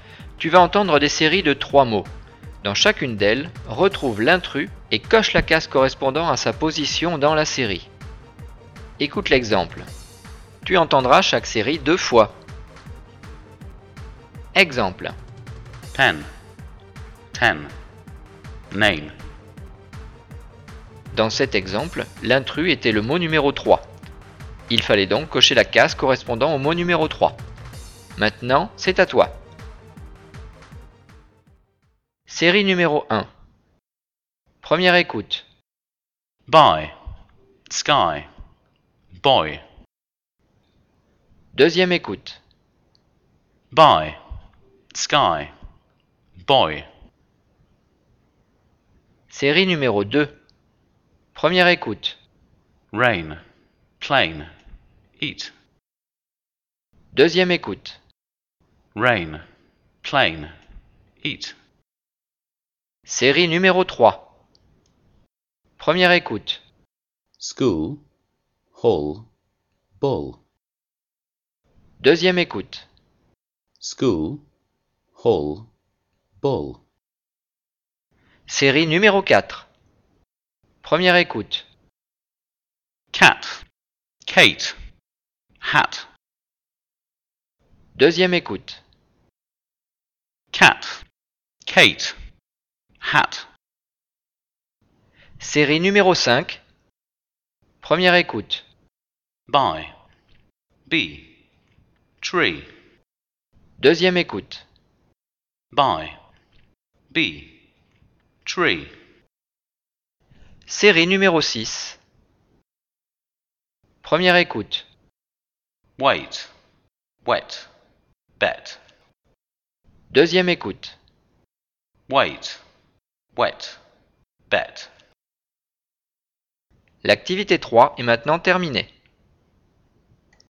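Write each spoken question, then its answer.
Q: Dans chacune d'elles, retrouve l'intrus et coche la case correspondant à sa position dans la série.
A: 3 (Boy)

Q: Dans chacune d'elles, retrouve l'intrus et coche la case correspondant à sa position dans la série.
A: 3 (Eat)

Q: Dans chacune d'elles, retrouve l'intrus et coche la case correspondant à sa position dans la série.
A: 1 (School)

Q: Dans chacune d'elles, retrouve l'intrus et coche la case correspondant à sa position dans la série.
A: 2 (Kate)

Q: Dans chacune d'elles, retrouve l'intrus et coche la case correspondant à sa position dans la série.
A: 1 (Buy)

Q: Dans chacune d'elles, retrouve l'intrus et coche la case correspondant à sa position dans la série.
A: 1 (Wait)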